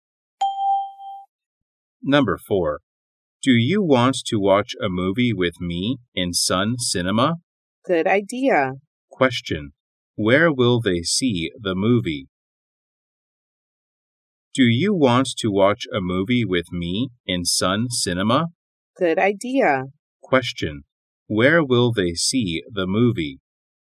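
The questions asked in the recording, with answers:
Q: Where will they see the movie?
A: In Sun Cinema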